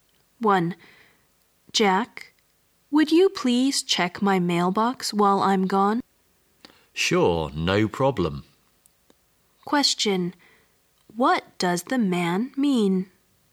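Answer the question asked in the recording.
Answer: He agrees to check her mailbox while she is away.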